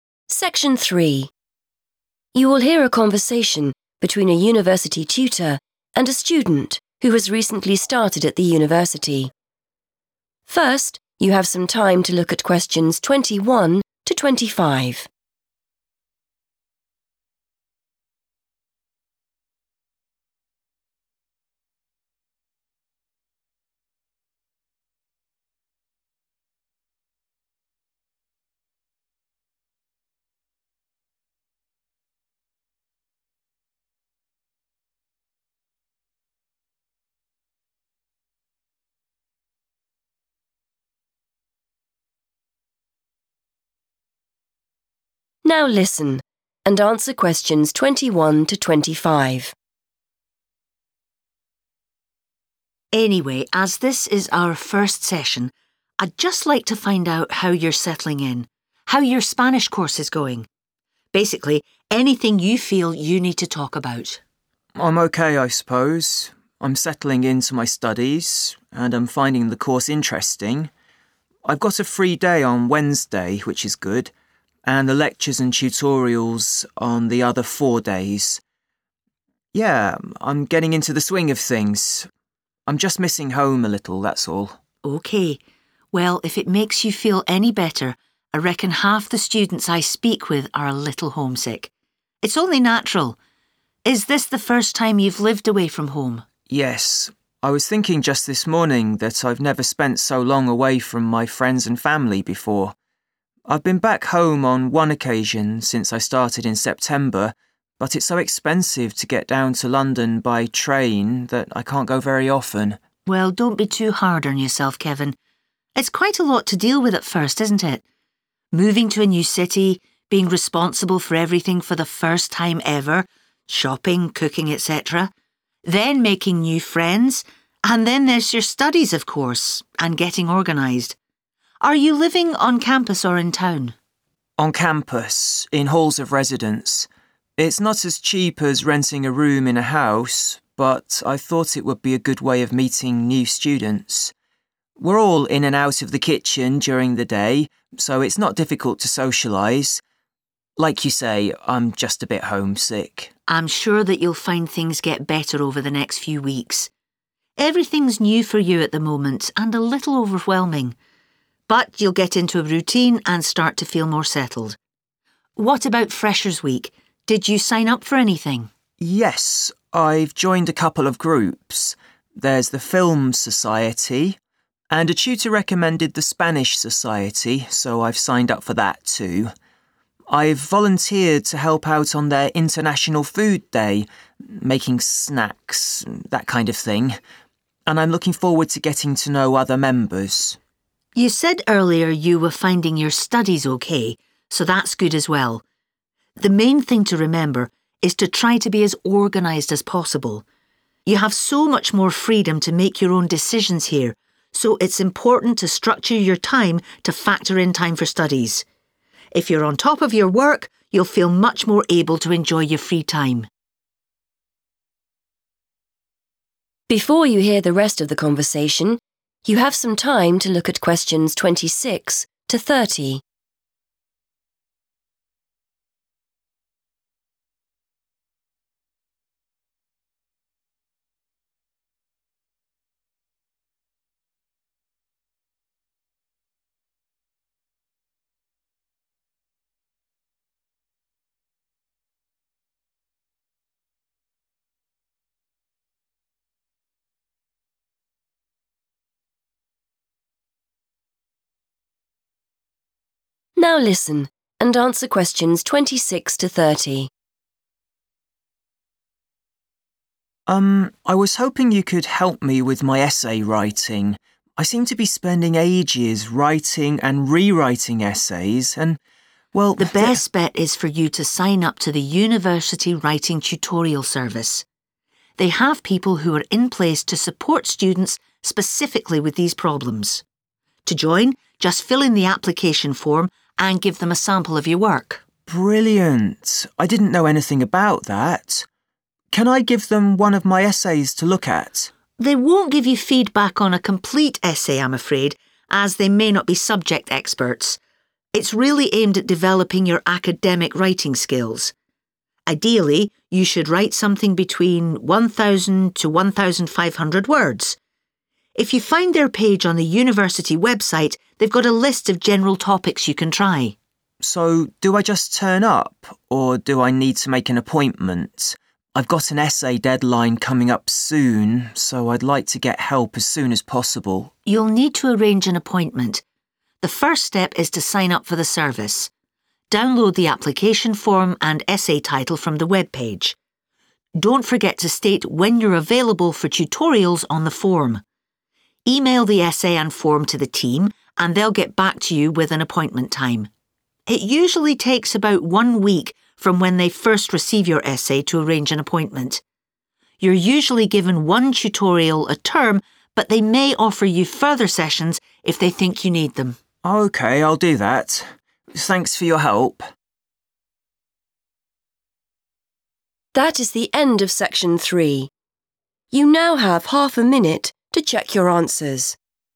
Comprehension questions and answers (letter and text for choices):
Choose the correct letter, A, B or C.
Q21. Kevin has lectures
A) three days a week.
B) on Wednesdays.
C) four days a week.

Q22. What does Kevin say about going home?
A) He last went home in September.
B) It is too expensive to travel by train.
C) He has been back home once.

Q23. Kevin thinks living in halls of residence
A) is cheaper than renting a house.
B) is a good way of getting to know people.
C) means it is difficult to use the kitchen.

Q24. Kevin joined the Spanish Society because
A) he wanted to learn how to cook.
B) someone told him it was good.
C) he knows people who are members.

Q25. The tutor says it is important for students to structure their time because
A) they have more independence at university.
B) they have too much free time.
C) it is the best way to get top grades in their work.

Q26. Send us a piece of work along with a completed 26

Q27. The team may not be familiar with your subject, so try one of the general 27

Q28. When applying for a tutorial, tell us when you are 28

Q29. We usually arrange to see you within 29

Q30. Under normal circumstances, students will be able to meet the team once every 30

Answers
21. C) four days a week.
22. C) He has been back home once.
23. B) is a good way of getting to know people.
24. B) someone told him it was good.
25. A) they have more independence at university.
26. application form
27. topics
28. available
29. a week / one week / 1 week
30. term

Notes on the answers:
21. The correct answer is supported by Kevin's description of his weekly schedule. He mentions that he does not have any classes on Wednesday, calling it a 'free day'. He then clarifies that his 'lectures and tutorials' (which are types of university classes) take place on the 'other four days' of the school week. Since he has classes on those four remaining days, he has lectures four days a week.
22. The correct answer is C because Kevin uses the phrase 'on one occasion,' which means he went home one time. He mentions that he started his course in September, and while he says the train is expensive, he still managed to go home once. In English, 'on one occasion' is a synonym for 'once.'
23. The correct answer is B because Kevin specifically says he chose to live in the halls of residence to meet other students. In English, 'meeting new students' is another way to say 'getting to know people.' He also mentions that being 'in and out of the kitchen' makes it easy to 'socialise,' which means to spend time talking and being friendly with others. Note that he says halls are NOT as cheap as renting a house, so choice A is wrong, and he says it is NOT difficult to socialise in the kitchen, so choice C is also wrong.
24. The correct answer is B because Kevin mentions that a tutor suggested the group to him. In English, when someone 'recommends' something, they are telling you that they think it is good and that you should try it. Therefore, choice B correctly summarizes that someone (the tutor) told him it was good.
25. The correct answer is A because the tutor says that at university, students have a lot of "freedom" to make their own "decisions." This is the same thing as having "independence." Because students have this freedom, the tutor explains they must "structure" or plan their time carefully to make sure they finish their schoolwork.
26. The correct answer is 'application form' because the tutor explains that to join the Writing Tutorial Service, Kevin needs to complete this specific document and provide a sample of his writing. The transcript uses the phrase 'fill in' which means to complete, and mentions the 'application form' as the required paperwork to send along with his work.
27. The correct answer is 'topics' because the tutor explains that the Writing Tutorial Service staff are not 'subject experts' and might not know about Kevin's specific field of study. Therefore, the tutor suggests that instead of using a school essay, Kevin should choose a subject from a list of 'general topics' available on the university's website. This matches the sentence in the task about choosing from the webpage.
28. The correct answer is correct because the tutor tells Kevin how to fill out the form for the Writing Tutorial Service. The tutor specifically mentions that the student needs to 'state when you're available,' which means providing information about their free time so an appointment can be matched to their schedule. In this context, 'available' is a keyword that describes having the time to attend a meeting.
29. The correct answer is one week because the tutor clearly explains the timeline for the Writing Tutorial Service. The sentence in the task asks how long it takes to see the team after 'receiving your application,' which matches the tutor's mention of when they 'first receive your essay.' The phrase 'one week' is the specific duration provided in the transcript.
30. The correct answer is term because the tutor explains how often students can meet with the Writing Tutorial Service. He mentions that a student is usually allowed one session per school period. In British English, these periods are called terms. The phrase once every term in the task matches the tutor's phrase one tutorial a term.

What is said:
Tutor: Anyway, as this is our first session, I'd just like to find out how you're settling in, how your Spanish course is going - basically, anything you feel you need to talk about.
Kevin: I'm OK, I suppose. I'm settling into my studies and I'm finding the course interesting. I've got a free day on Wednesday, which is good, and lectures and tutorials on the other four days. Yeah, I'm getting into the swing of things. I'm just missing home a little, that's all.
Tutor: OK. Well, if it makes you feel any better, I reckon half the students I speak with are a little homesick. It's only natural. Is this the first time you've lived away from home?
Kevin: Yes. I was thinking just this morning that I've never spent so long away from my friends and family before. I've been back home on one occasion since I started in September, but it's so expensive to get down to London by train that I can can't go very often.
Tutor: Well, don't be too hard on yourself, Kevin. It's quite a lot to deal with at first, isn't it? Moving to a new city, being responsible for everything for the first time ever, shopping, cooking, etc. Then making new friends, and then there's your studies, of course, and getting organised. Are you living on campus or in town?
Kevin: On campus, in halls of residence. It's not as cheap as renting a room in a house but I thought it would be a good way of meeting new students. We're all in and out of the kitchen during the day, so it's not difficult to socialise. Like you say, I'm just a bit homesick.
Tutor: I'm sure that you'll find things get better over the next few weeks. Everything's new for you at the moment and a little overwhelming. But you'll get into a routine and start to feel more settled. What about Freshers' Week? Did you sign up for anything?
Kevin: Yes. I've joined a couple of groups. There's the Film Society, and a tutor recommended the Spanish Society, so I've signed up for that too. I've volunteered to help out on their International Food Day - making snacks, that kind of thing. And I'm looking forward to getting to know other members.
Tutor: You said earlier you were finding your studies OK, so that's good as well. The main thing to remember is to try to be as organised as possible. You have so much more freedom to make your own decisions here, so it's important to structure your time to factor in time for studies. If you're on top of your work, you'll feel much more able to enjoy your free time.
Kevin: Um, I was hoping you could help me with my essay writing. I seem to be spending ages writing and re-writing essays and, well, ...
Tutor: The best bet is for you to sign up to the university Writing Tutorial Service. They have people who are in place to support students specifically with these problems. To join, just fill in the application form and give them a sample of your work.
Kevin: Brilliant! I didn't know anything about that. Can I give them one of my essays to look at?
Tutor: They won't give you feedback on a complete essay, I'm afraid, as they may not be subject experts. It's really aimed at developing your academic writing skills. Ideally, you should write something between 1,000 to 1,500 words. If you find their page on the university website, they've got a list of general topics you can try.
Kevin: So do I just turn up? Or do I need to make an appointment? I've got an essay deadline coming up soon, so I'd like to get help as soon as possible.
Tutor: You'll need to arrange an appointment. The first step is to sign up for the service. Download the application form and essay title from the webpage. Don't forget to state when you're available for tutorials on the form. Email the essay and form to the team and they'll get back to you with an appointment time. It usually takes about one week from when they first receive your essay to arrange an appointment. You're usually given one tutorial a term but they may offer you further sessions if they think you need them.
Kevin: OK, I'll do that. Thanks for your help.